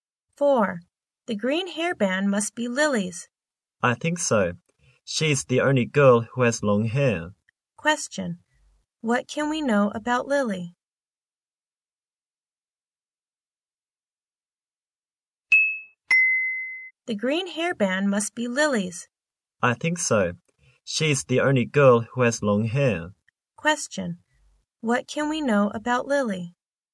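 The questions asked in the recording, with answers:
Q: What can we know about Lily?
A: She has long hair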